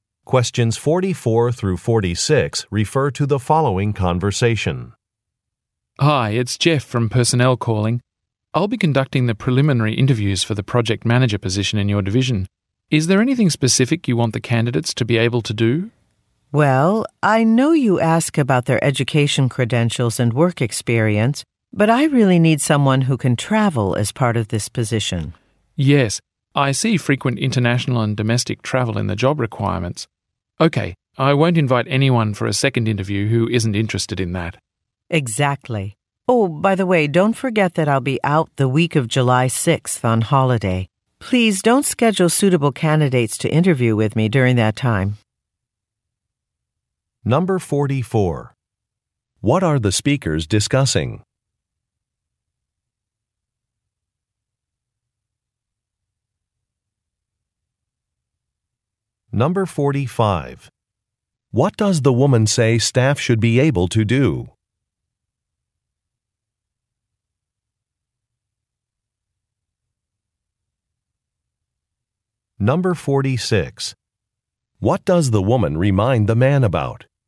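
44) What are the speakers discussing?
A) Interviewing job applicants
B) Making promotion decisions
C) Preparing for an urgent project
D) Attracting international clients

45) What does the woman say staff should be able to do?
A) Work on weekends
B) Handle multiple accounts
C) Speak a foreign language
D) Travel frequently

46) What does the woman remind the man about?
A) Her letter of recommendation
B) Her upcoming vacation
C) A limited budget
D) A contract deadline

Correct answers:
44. A
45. D
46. B

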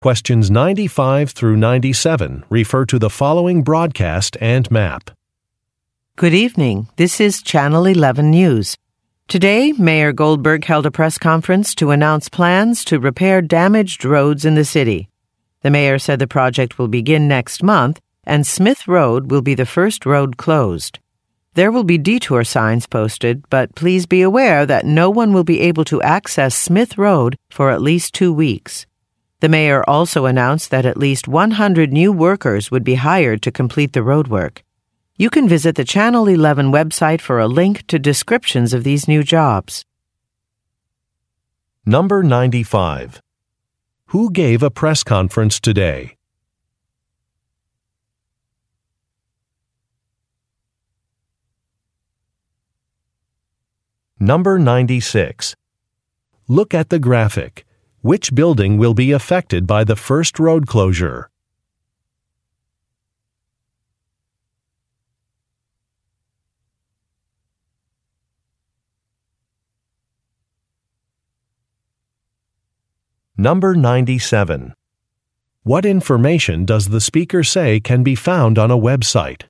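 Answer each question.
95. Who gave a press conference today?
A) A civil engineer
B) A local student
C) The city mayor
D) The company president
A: C

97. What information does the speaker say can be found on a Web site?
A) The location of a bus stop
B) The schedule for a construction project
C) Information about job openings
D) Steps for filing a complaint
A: C

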